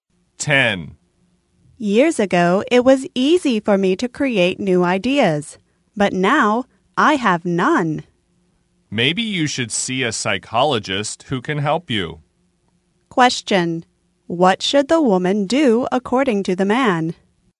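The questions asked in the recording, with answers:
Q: What should the woman do according to the man?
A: See a psychologist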